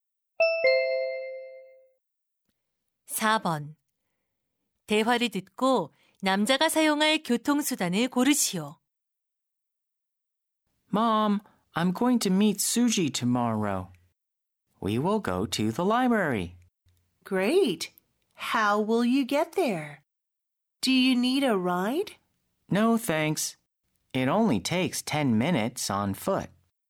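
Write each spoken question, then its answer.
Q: 대화를 듣고 남자가 사용할 교통수단을 고르시오.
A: 걸어서 (도보)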